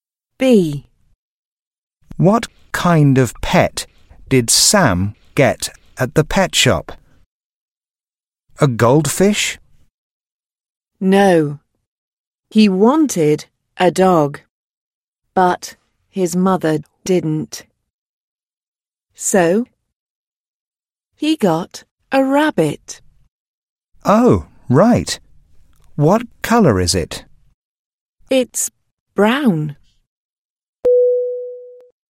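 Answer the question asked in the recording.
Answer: a rabbit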